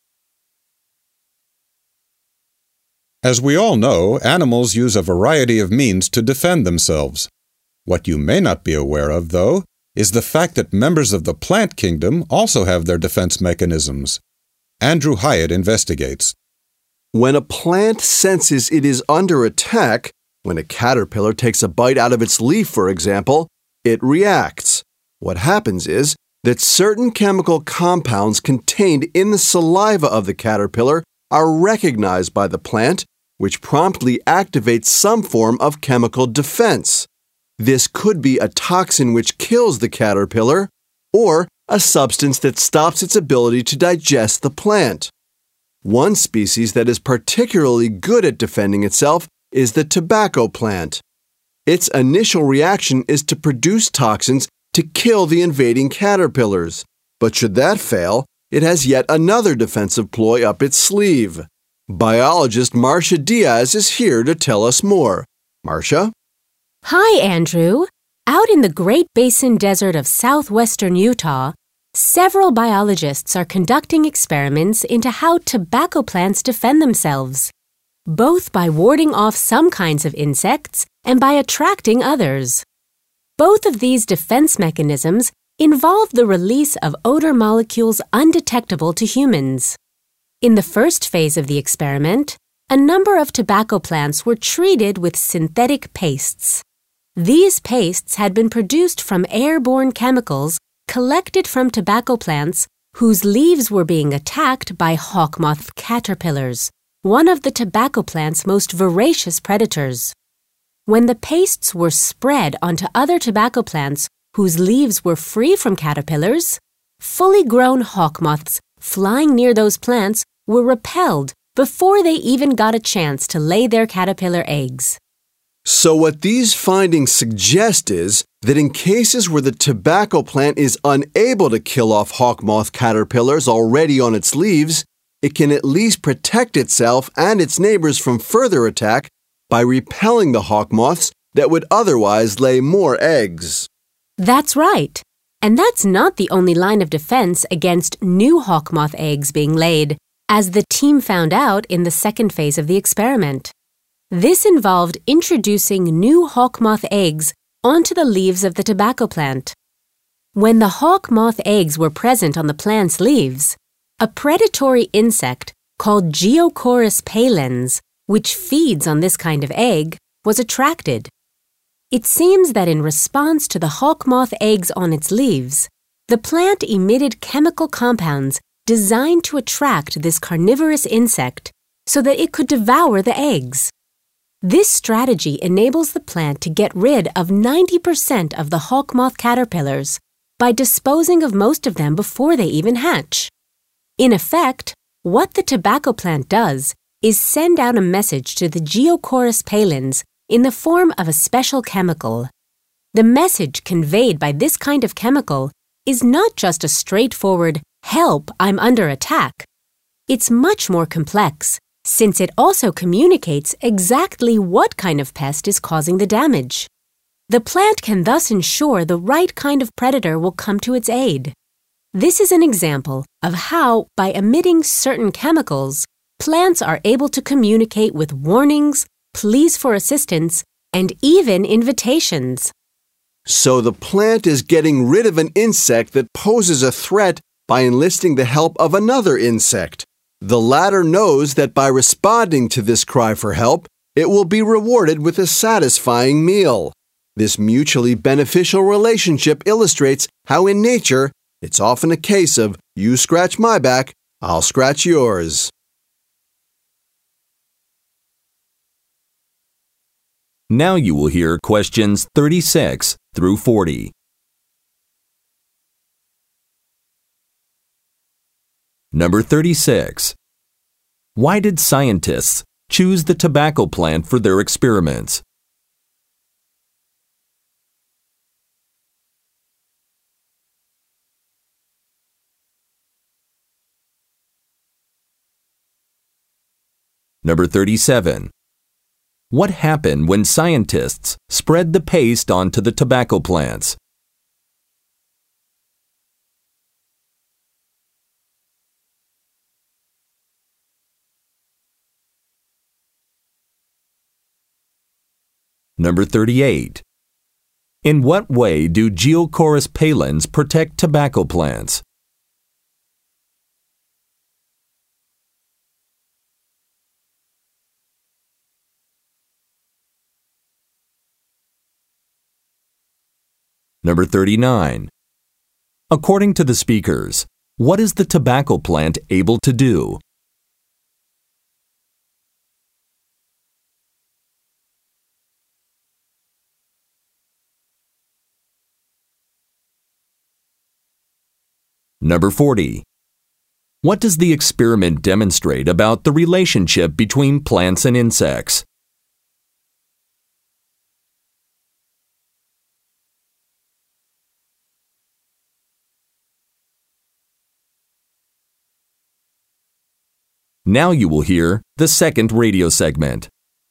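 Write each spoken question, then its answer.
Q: What happened when scientists spread the paste onto the tobacco plants?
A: Adult hawk moths were repelled before laying eggs

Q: In what way do Geochorus palins protect tobacco plants?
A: They eat the hawk moth eggs before they hatch

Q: What does the experiment demonstrate about the relationship between plants and insects?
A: It can be mutually beneficial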